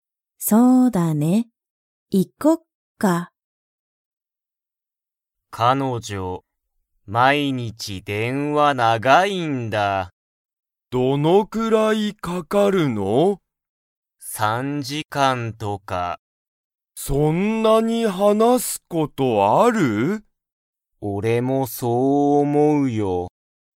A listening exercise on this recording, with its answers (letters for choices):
Comprehension Quiz (Skip if you don't understand the conversation yet)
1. ____は、毎日電話(まいにちでんわ)が長(なが)い。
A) ケン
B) ケンの彼女(かのじょ)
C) カズヤ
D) カズヤの友達(ともだち)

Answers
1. B